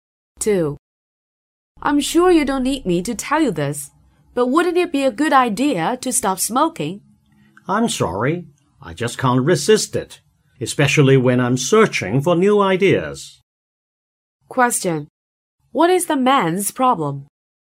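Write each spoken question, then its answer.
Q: What is the man's problem?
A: He can't stop smoking, especially when he is looking for new ideas.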